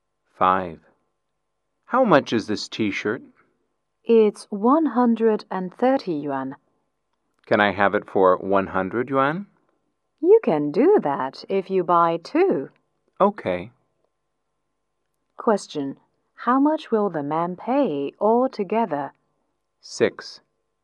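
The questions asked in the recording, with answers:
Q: How much will the man pay altogether?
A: 200 yuan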